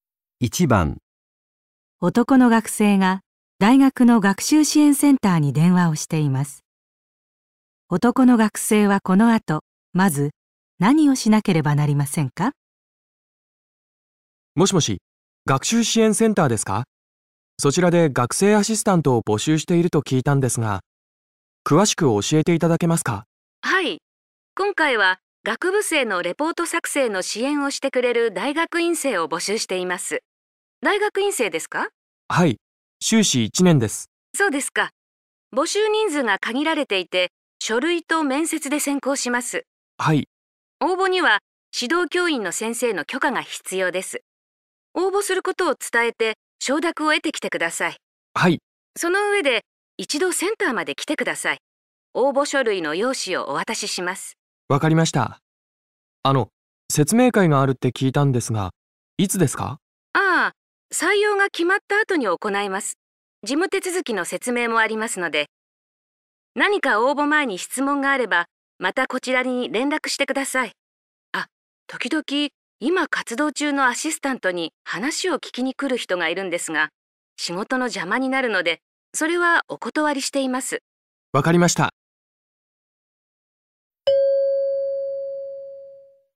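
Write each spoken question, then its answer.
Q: 男の学生はこの後、まず何をしなければなりませんか?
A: 指導教員の先生に応募することを伝えて許可をもらう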